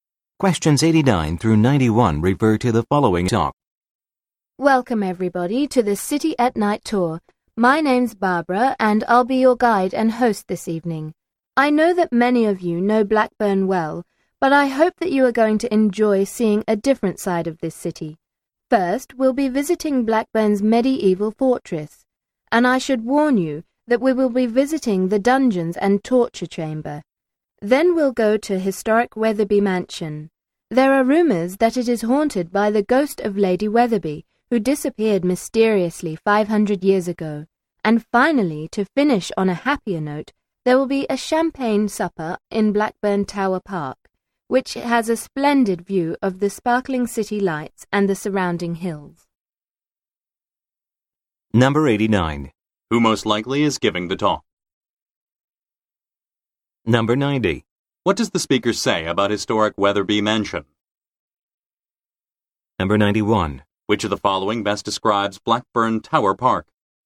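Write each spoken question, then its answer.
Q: Who most likely is giving the talk?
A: A tour guide

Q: What does the speaker say about historic Wetherby Mansion?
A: It is rumored to be haunted by Lady Wetherby's ghost

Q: Which of the following best describes Blackburn Tower Park?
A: It has a splendid view of the city lights and hills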